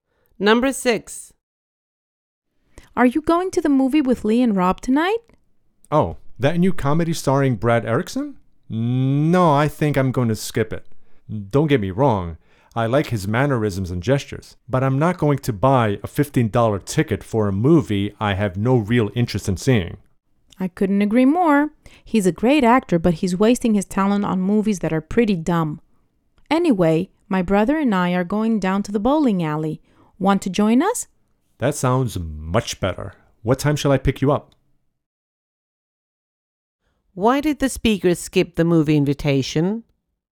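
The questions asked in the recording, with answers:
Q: Why did the speaker skip the movie invitation?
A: He has no real interest in the movie and won't pay $15 for it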